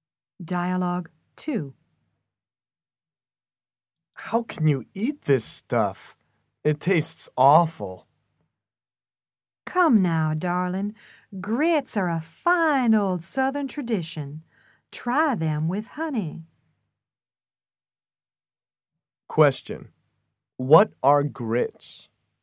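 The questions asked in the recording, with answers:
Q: What are grits?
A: A traditional southern food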